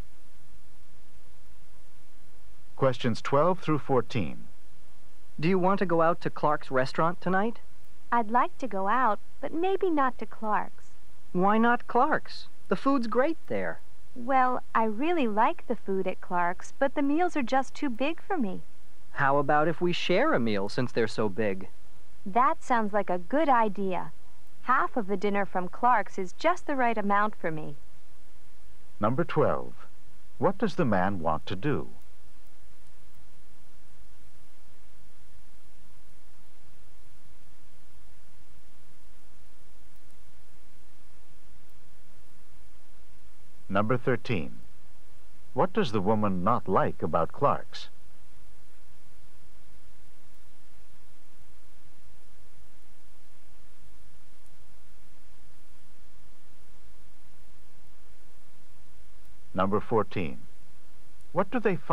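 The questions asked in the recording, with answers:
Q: What does the man want to do?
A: Go out to Clark's restaurant tonight

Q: What does the woman not like about Clark's?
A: The meals are too big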